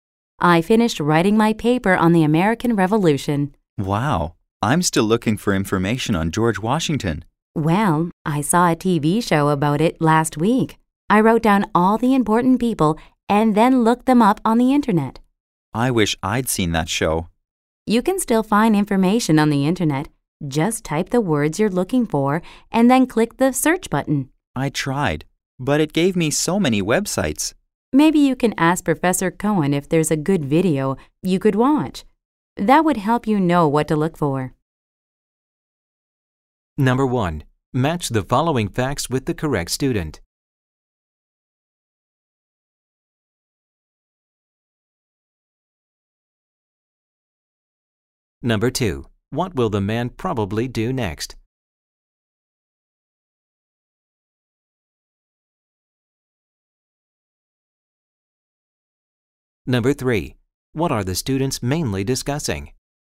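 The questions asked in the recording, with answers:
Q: What are the students mainly discussing?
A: Finding information for their papers on the American Revolution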